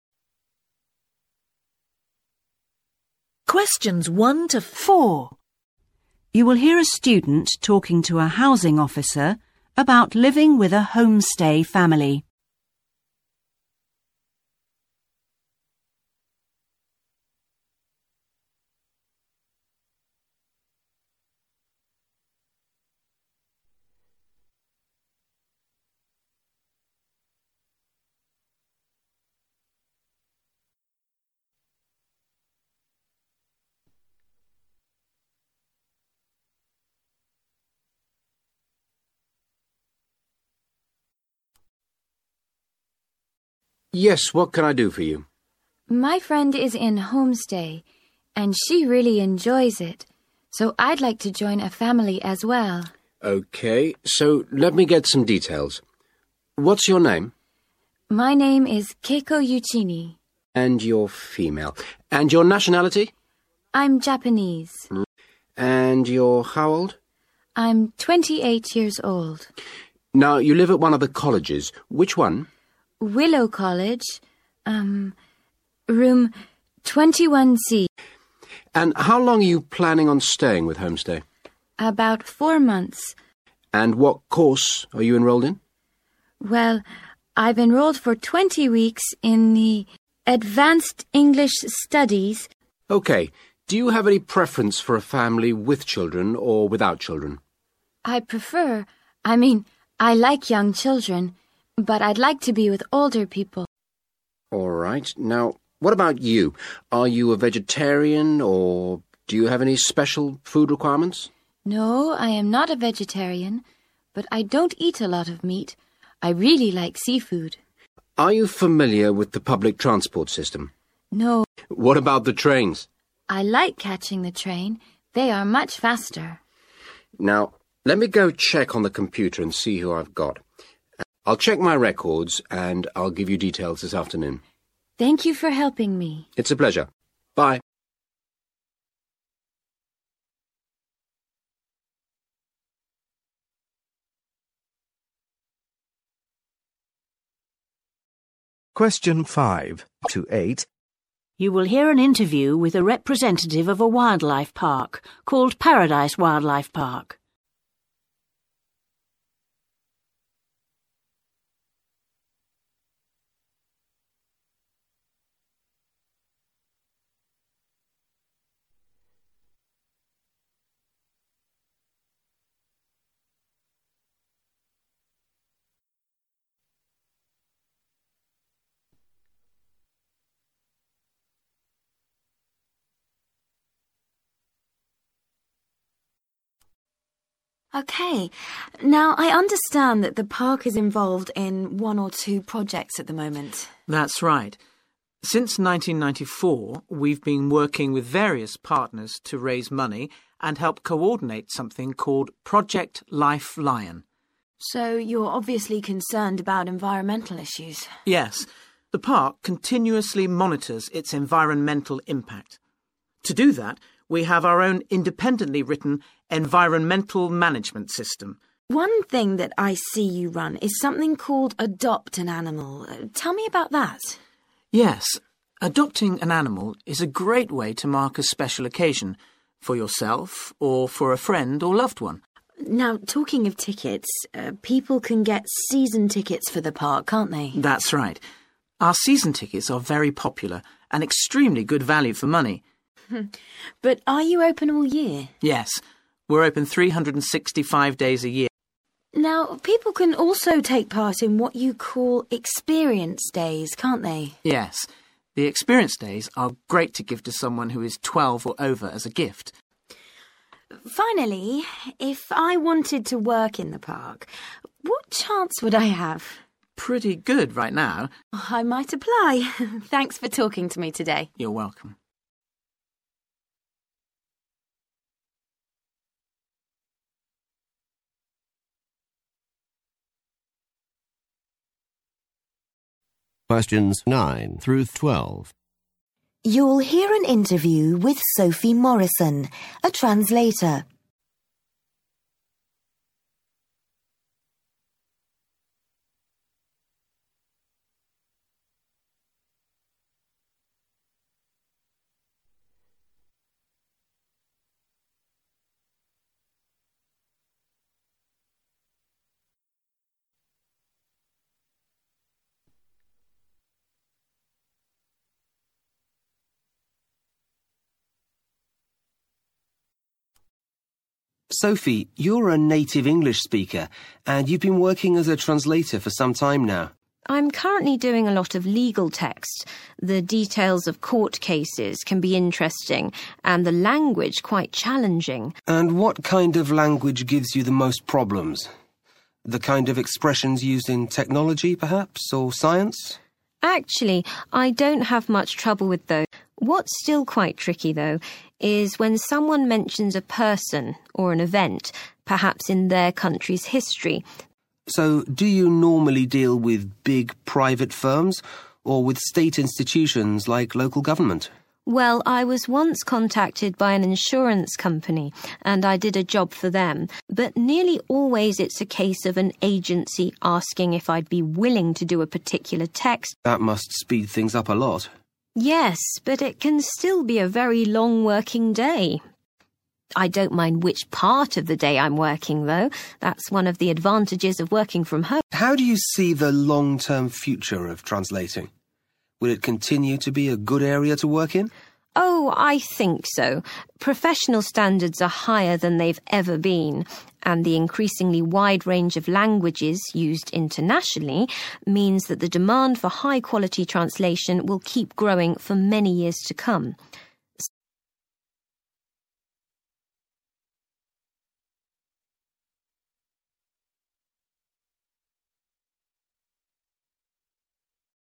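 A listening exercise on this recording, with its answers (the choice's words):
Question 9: How long did YuichinI intend to live with a homestay family?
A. Approx two months.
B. About sixteen weeks.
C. Three months and longer.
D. About twenty weeks.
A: About sixteen weeks.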